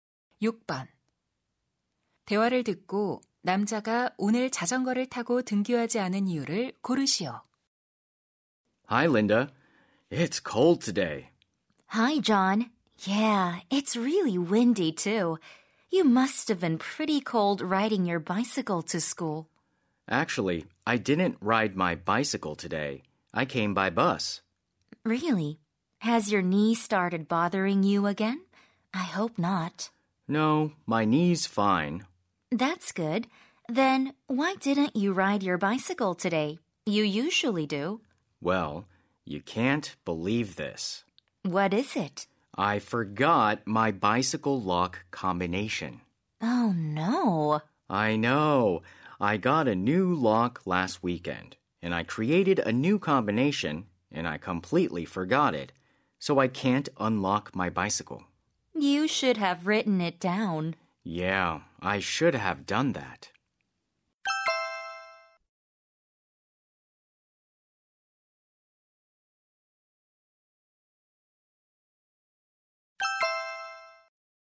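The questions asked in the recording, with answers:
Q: 대화를 듣고 남자가 오늘 자전거를 타고 등교하지 않은 이유를 고르시오.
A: 자전거 자물쇠 비밀번호를 잊어버려서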